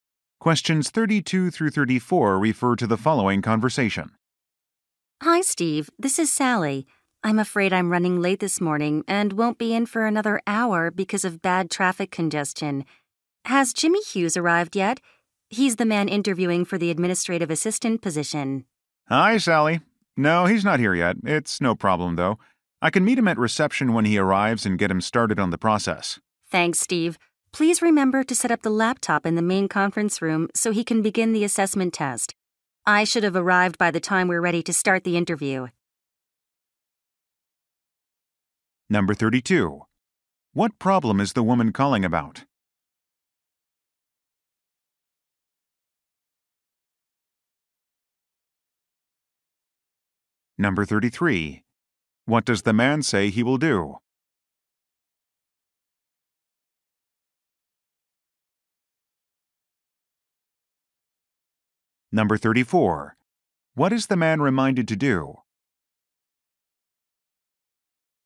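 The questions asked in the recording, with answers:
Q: What problem is the woman calling about?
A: She is running late because of heavy traffic.

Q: What does the man say he will do?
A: Meet the job candidate at reception and get him started.

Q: What is the man reminded to do?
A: Set up the laptop in the main conference room.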